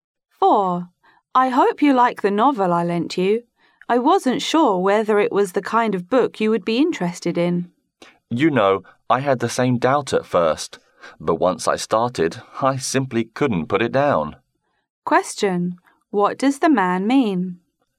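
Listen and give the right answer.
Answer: He found the novel so interesting he couldn't put it down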